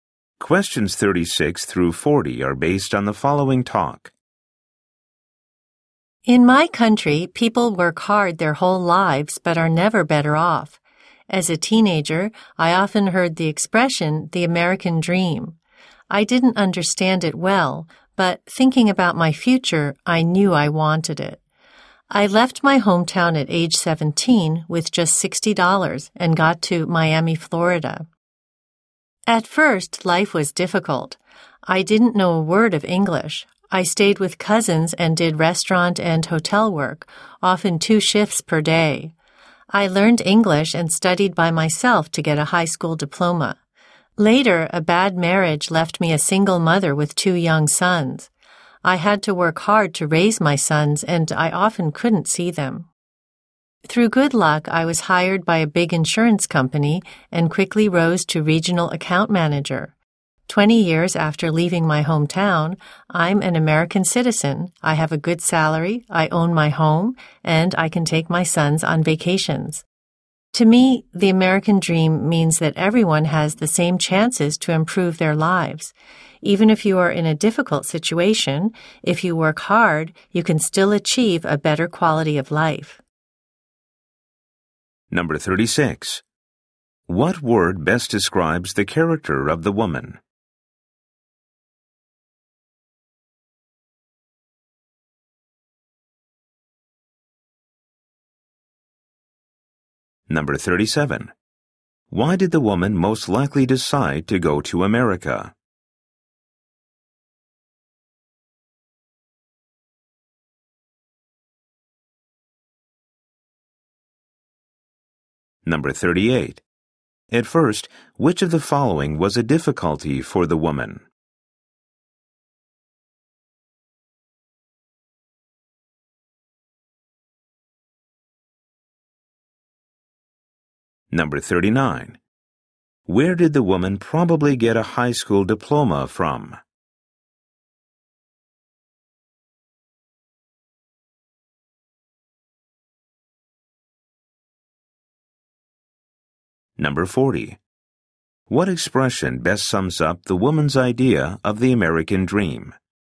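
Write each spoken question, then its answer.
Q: Why did the woman most likely decide to go to America?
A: To achieve the American dream and a better life.

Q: At first, which of the following was a difficulty for the woman?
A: She didn't know any English.

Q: What expression best sums up the woman's idea of the American dream?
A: Everyone has the same chances to improve their lives.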